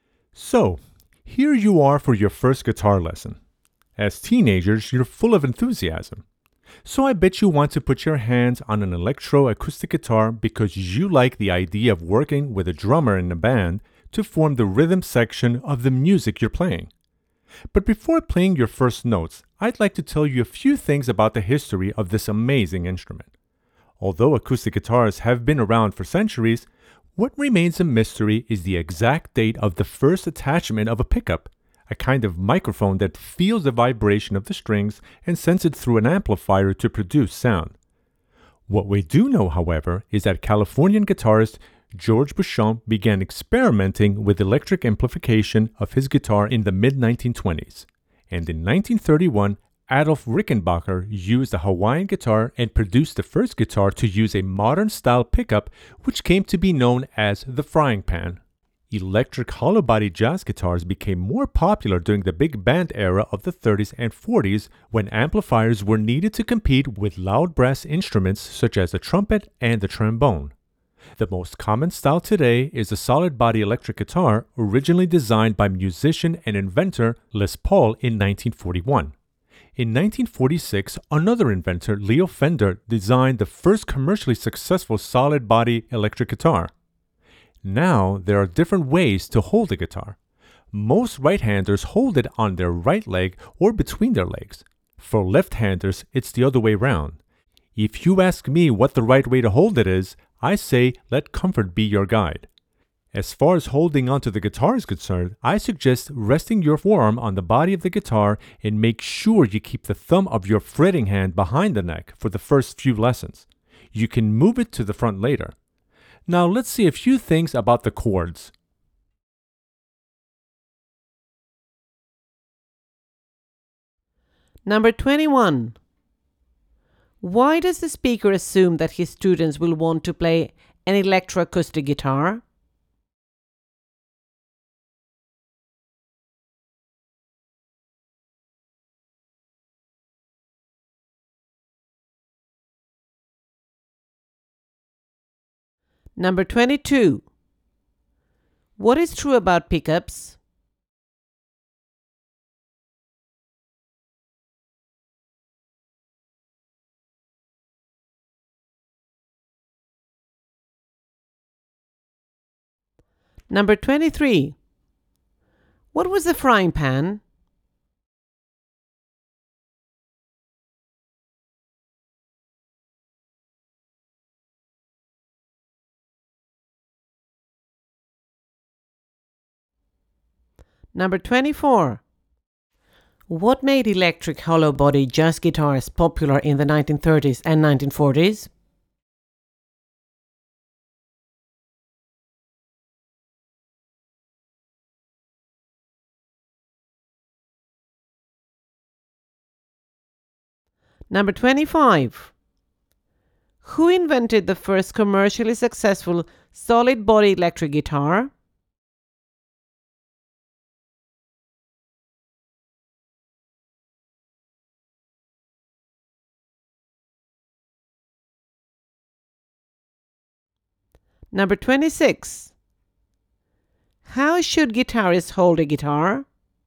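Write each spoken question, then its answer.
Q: Why does the speaker assume that his students will want to play an electroacoustic guitar?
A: Because as teenagers they like the idea of playing with a drummer in a band

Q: What was the frying pan?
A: The first guitar to use a modern-style pickup, made by Adolf Rickenbacker in 1931

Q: What made electric hollow-body jazz guitars popular in the 1930s and 1940s?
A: Amplifiers were needed to compete with loud brass instruments in big bands

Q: Who invented the first commercially successful solid-body electric guitar?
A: Leo Fender

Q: How should guitarists hold a guitar?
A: Whatever way is most comfortable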